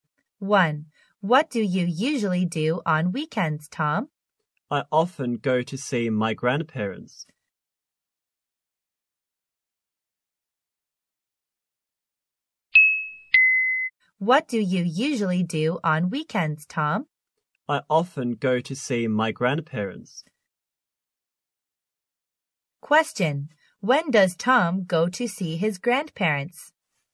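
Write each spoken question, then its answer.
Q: When does Tom go to see his grandparents?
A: On weekends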